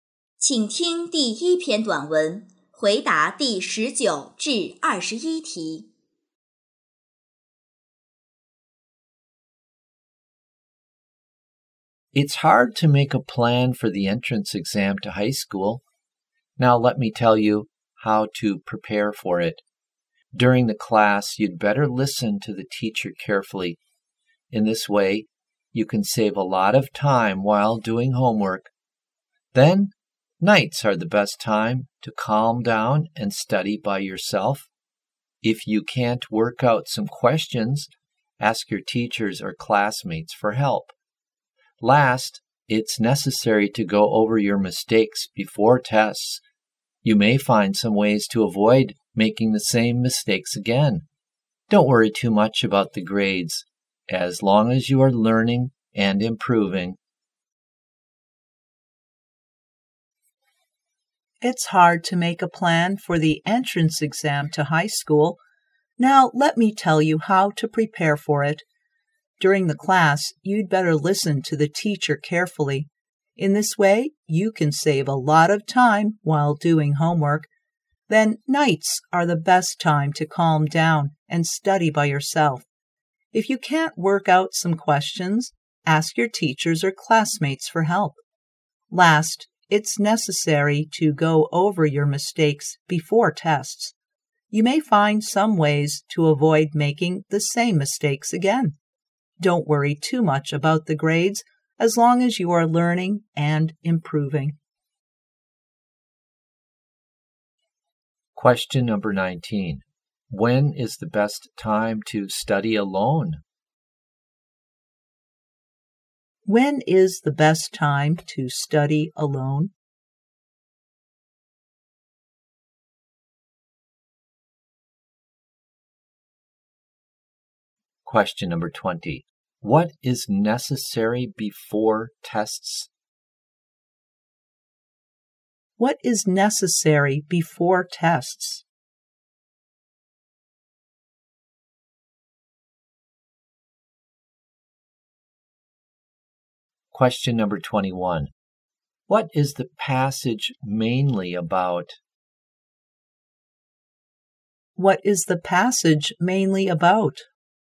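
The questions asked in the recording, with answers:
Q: When is the best time to study alone?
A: At night

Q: What is necessary before tests?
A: Going over your mistakes

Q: What is the passage mainly about?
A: How to prepare for the entrance exam to high school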